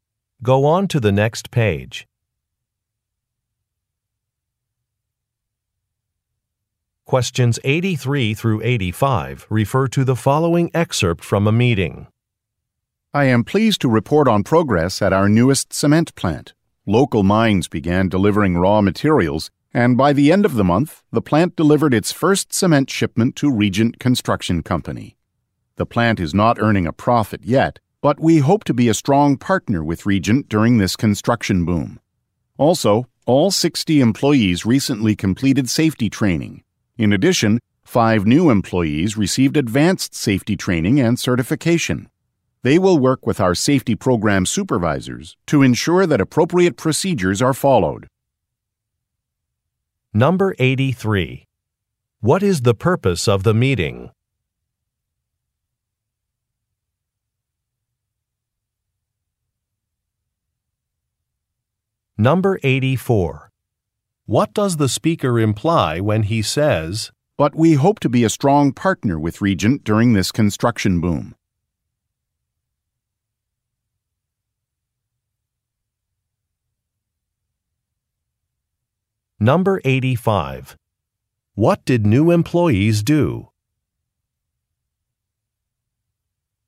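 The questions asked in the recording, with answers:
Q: What is the purpose of the meeting?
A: To report on progress at a new cement plant

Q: What did new employees do?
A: Received advanced safety training and certification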